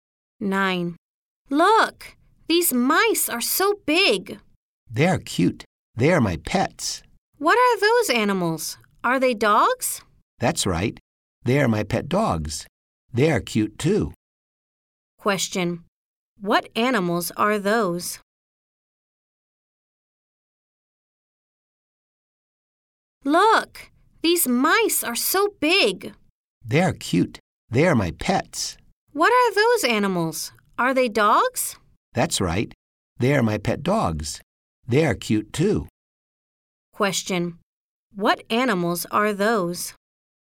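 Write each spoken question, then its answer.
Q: What animals are those?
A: They are dogs.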